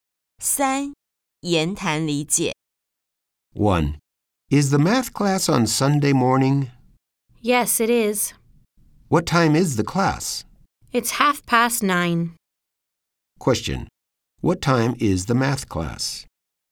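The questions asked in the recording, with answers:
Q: What time is the math class?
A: 9:30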